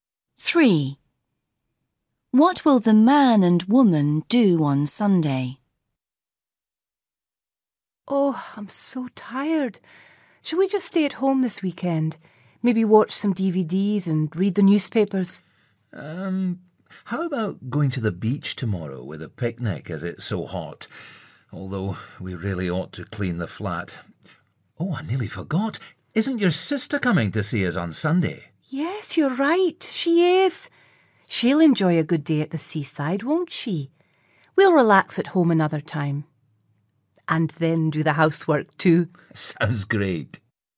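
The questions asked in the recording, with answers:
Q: What will the man and woman do on Sunday?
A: Go to the beach with his sister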